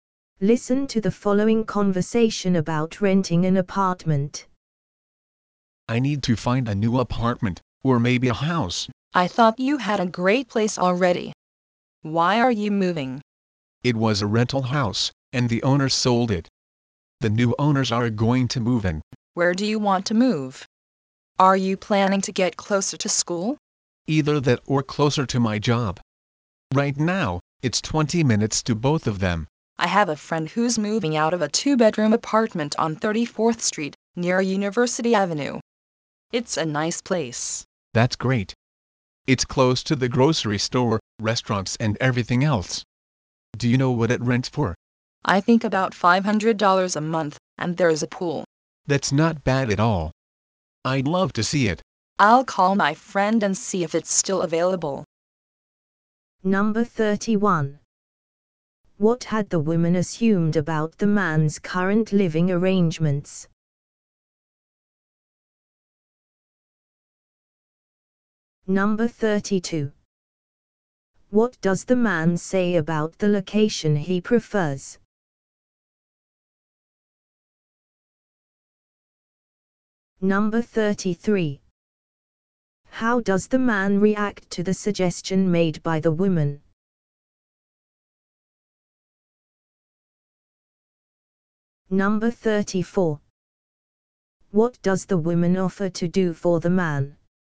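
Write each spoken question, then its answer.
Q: What had the woman assumed about the man's current living arrangements?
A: That he already had a great place

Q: What does the man say about the location he prefers?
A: Closer to school or to his job

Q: How does the man react to the suggestion made by the woman?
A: He likes it and would love to see the apartment

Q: What does the woman offer to do for the man?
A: Call her friend to see if the apartment is still available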